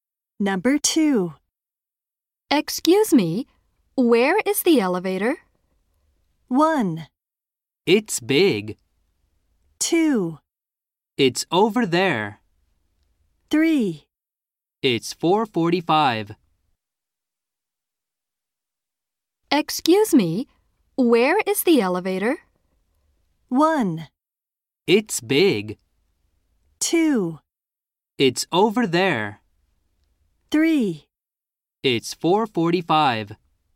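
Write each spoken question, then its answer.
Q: Excuse me, where is the elevator?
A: 2: It's over there.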